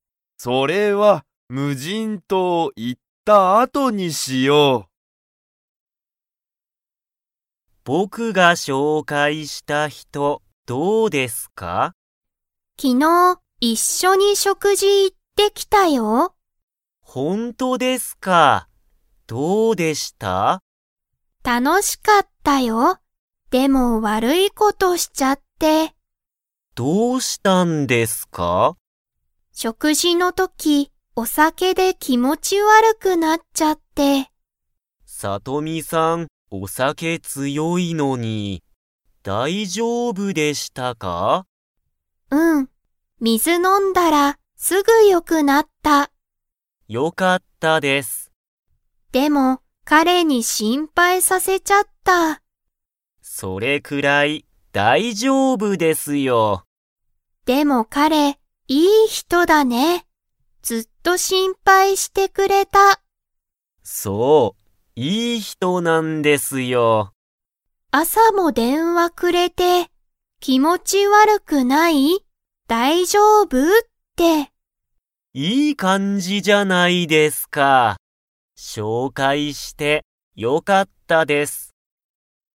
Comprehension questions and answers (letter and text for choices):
Comprehension Quiz (Skip if you don't understand the conversation yet)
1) さとみは食事しょくじの時とき、何なにで気持きもち悪わるくなりましたか?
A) ご飯はん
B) 魚さかな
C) 電話でんわ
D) お酒さけ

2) 彼かれは、朝あささとみに電話でんわ 。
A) した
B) しなかった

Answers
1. D) お酒さけ
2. A) した

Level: Level 3